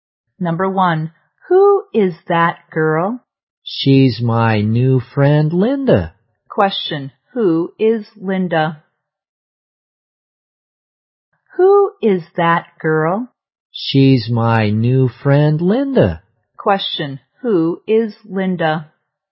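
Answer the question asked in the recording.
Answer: The speaker's new friend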